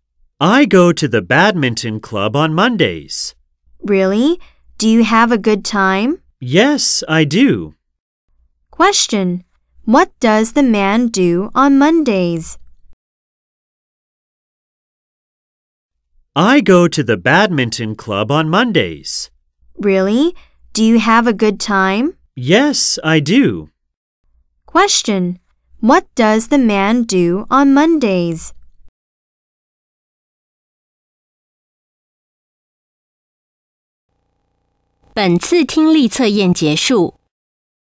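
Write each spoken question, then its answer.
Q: What does the man do on Mondays?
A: He goes to the badminton club.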